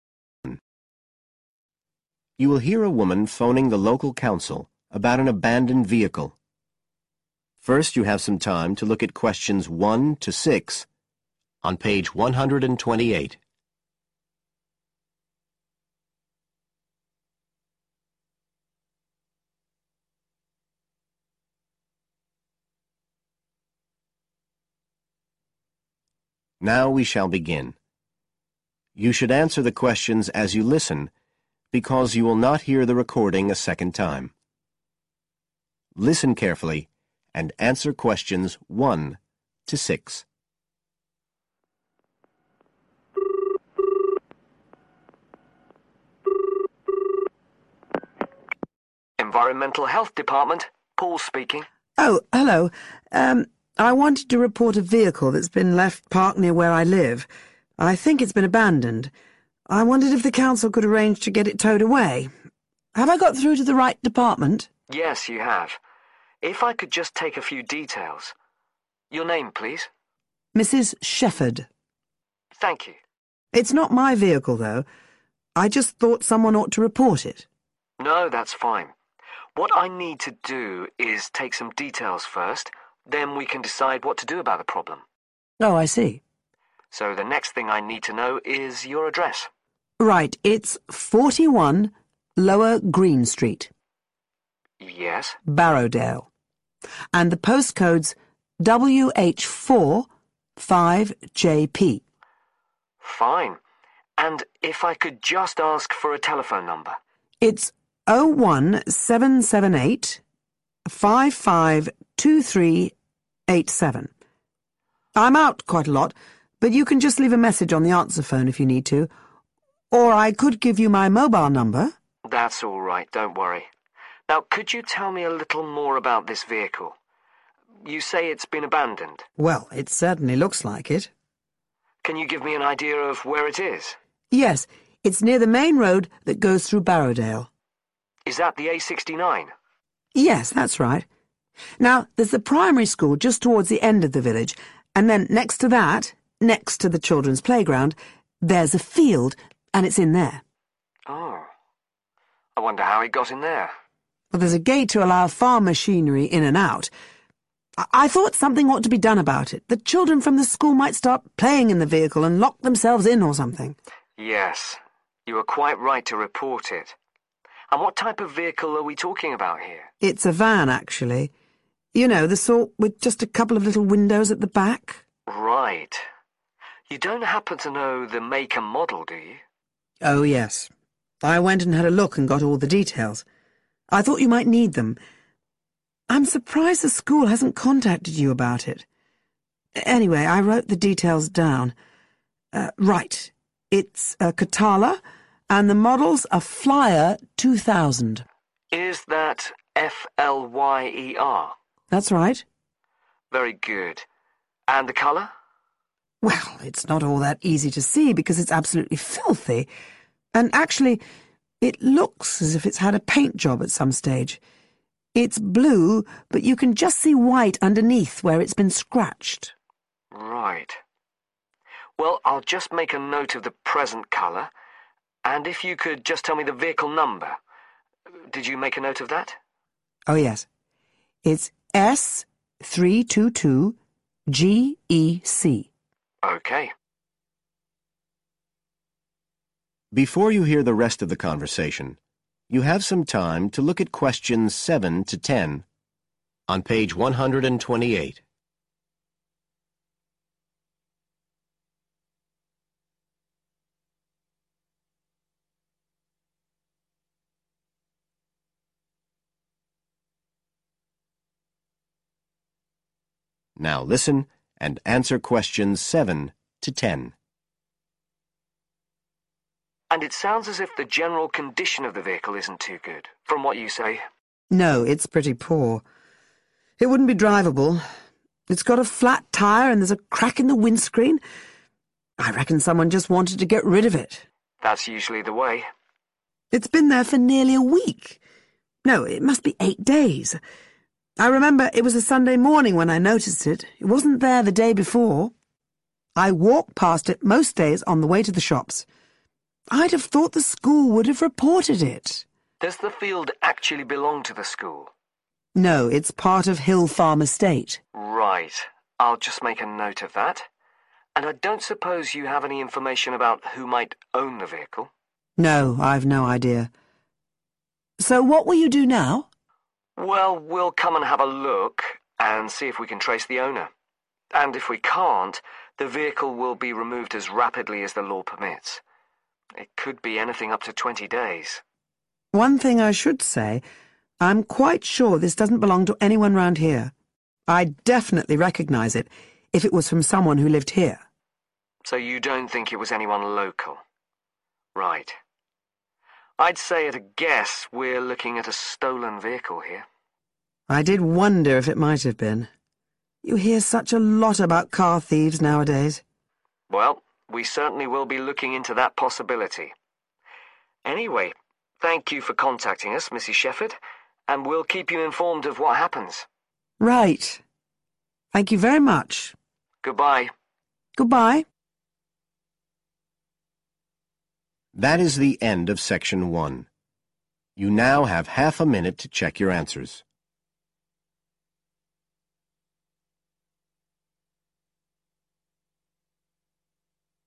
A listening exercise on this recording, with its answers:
Complete the notes below. Write NO MORE THAN THREE WORDS AND/ OR A NUMBER for each answer.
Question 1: Address: 41, (1) .............. Barrowdale WH45JP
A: lower green street

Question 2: Telephone: (2) ..............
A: 01778552387

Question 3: Vehicle location: in (3) .............. near main road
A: field

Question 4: Type of vehicle: (4) ..............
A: van

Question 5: Model: (5) ..............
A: flyer 2000

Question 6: Present color of vehicle: (6) ..............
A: blue

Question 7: General condition: poor – one (7) .............. , cracked windscreen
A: flat tyre

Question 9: Land belongs to: (9) ..............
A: hill farm estate

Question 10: Other notes: vehicle does not belong to a (10) ............... resident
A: local